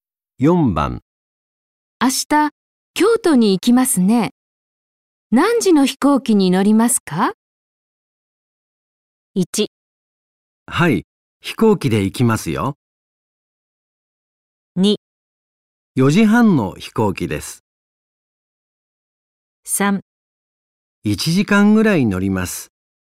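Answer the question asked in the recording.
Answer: 2: 4時半の飛行機です。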